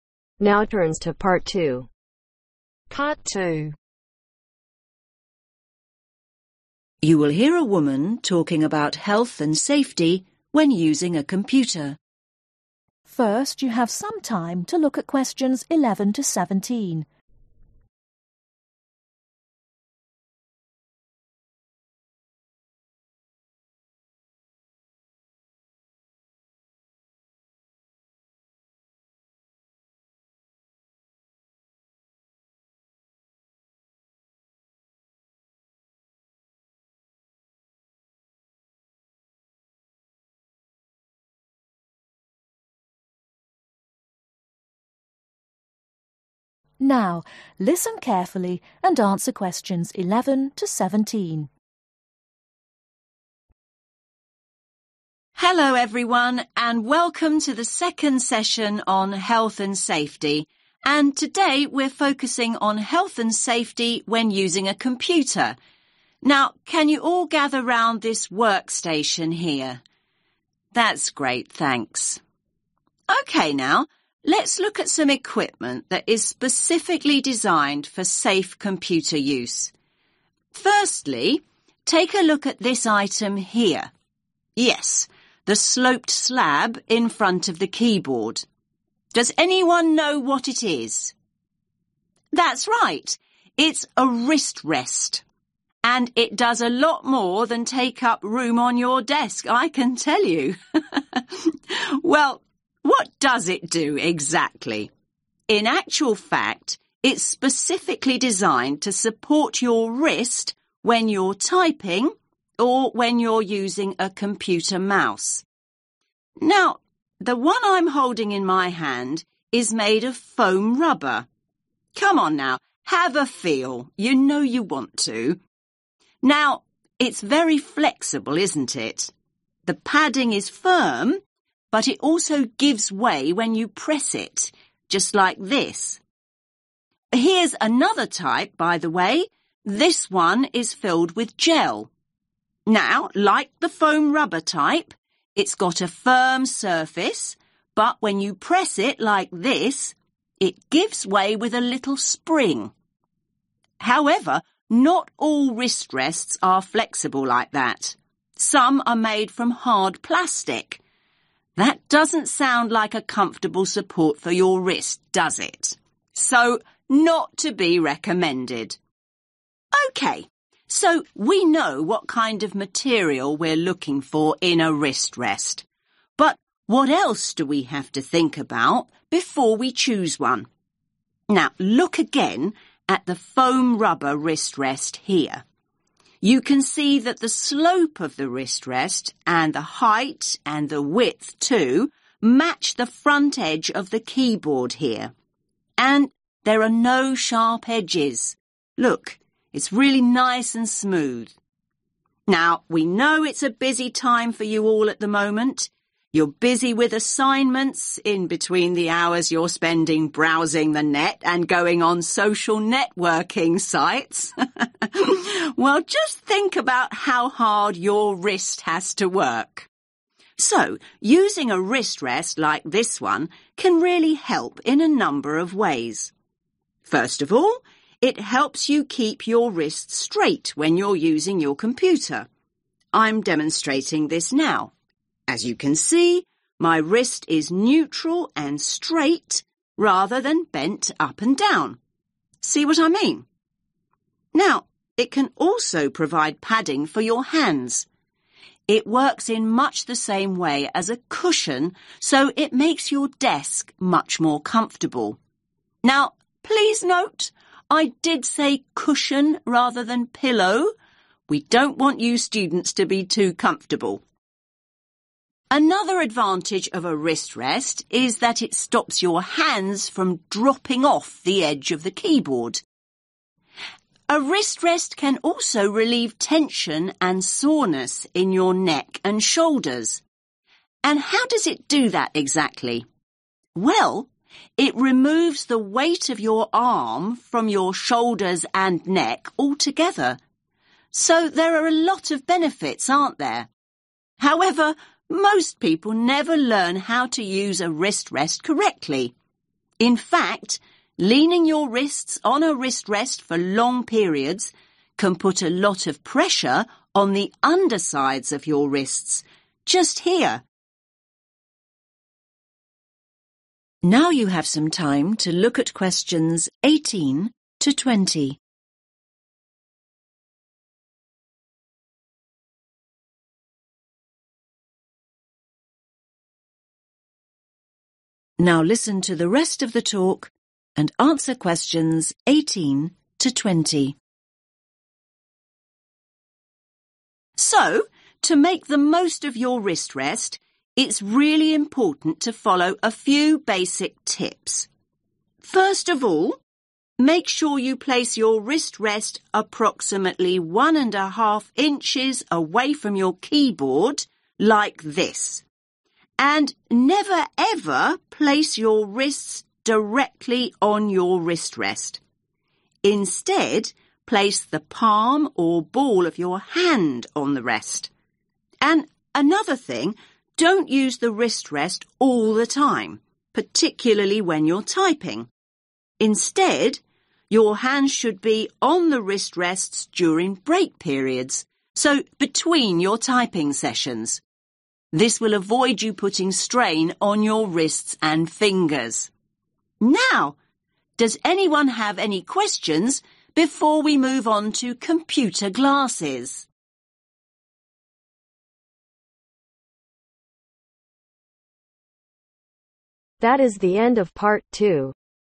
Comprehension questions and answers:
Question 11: (11)............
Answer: Foam Rubber

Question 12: (12)............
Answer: Gel

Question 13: - Make sure it is free of (13)............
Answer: Sharp Edges

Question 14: - can help the wrist to maintain a (14)............ and neutral position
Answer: Straight

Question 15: - prevents the hands (15)............ the edge of the keyboard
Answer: Dropping off

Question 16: - can reduce pain in the (16)............ and shoulders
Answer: Neck

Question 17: - may increase pressure on the (17)............ of the wrist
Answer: Undersides

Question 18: How far inches should the wrist rest be placed from the keyboard ?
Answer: One and Half

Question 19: Which parts of the hand should you can place on the wrist rest ?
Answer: Palm and Ball/Ball and Palm

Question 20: When is the best time to use a wrist rest ?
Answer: (During) Break Periods